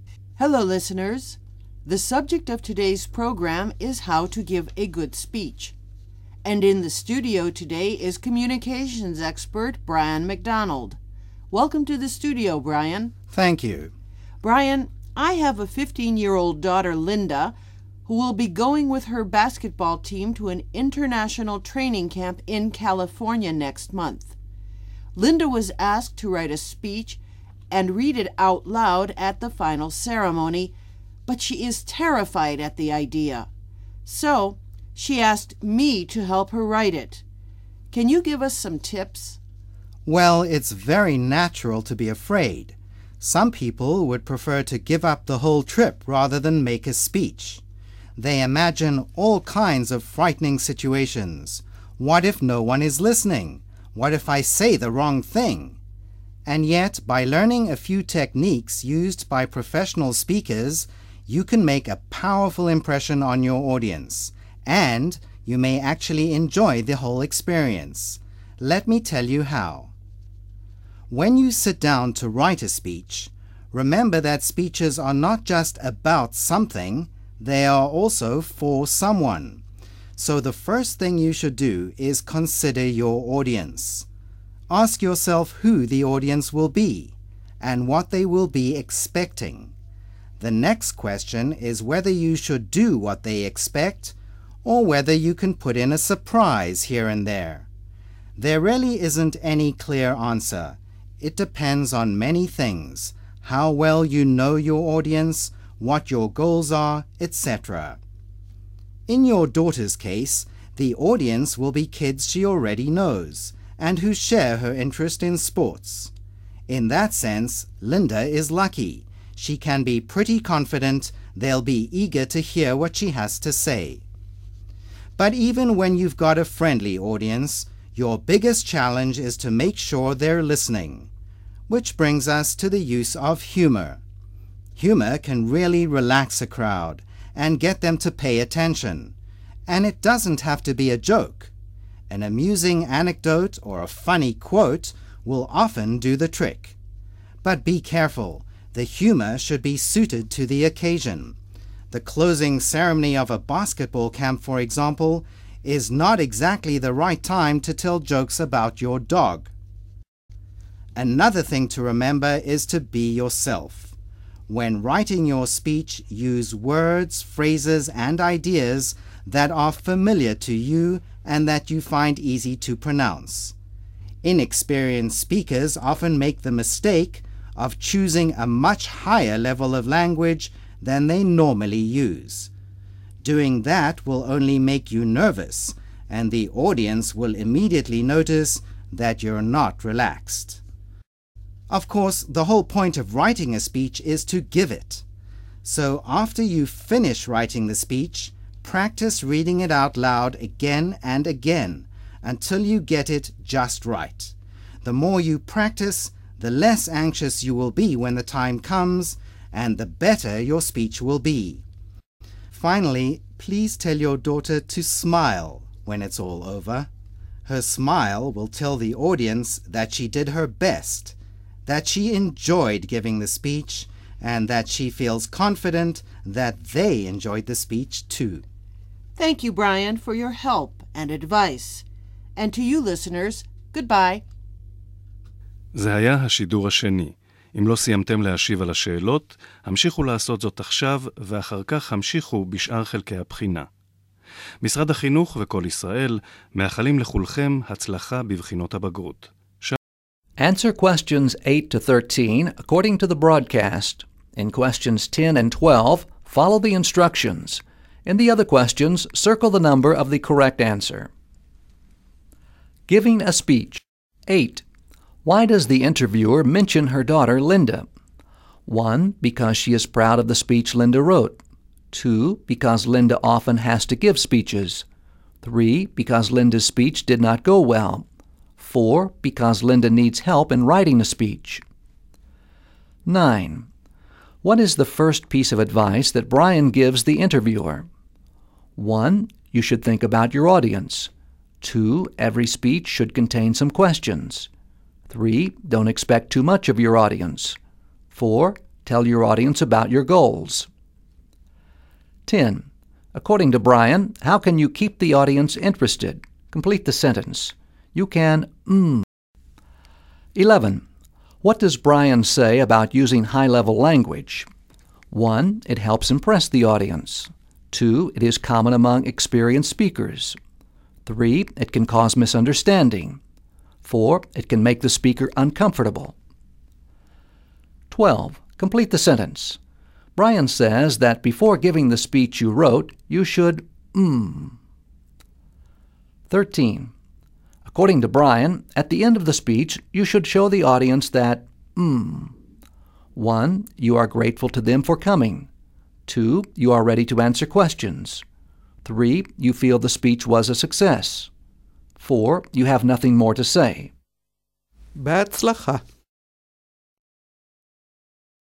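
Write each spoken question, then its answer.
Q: Why does the interviewer mention her daughter, Linda?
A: 4: Because Linda needs help in writing a speech.

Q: What is the first piece of advice that Brian gives the interviewer?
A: 1: You should think about your audience.

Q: According to Brian, how can you keep the audience interested?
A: use humor

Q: What does Brian say about using high-level language?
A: 4: It can make the speaker uncomfortable.

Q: Brian says that before giving the speech you wrote, you should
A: practice reading it out loud again and again

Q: According to Brian, at the end of the speech, you should show the audience that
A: 3: You feel the speech was a success.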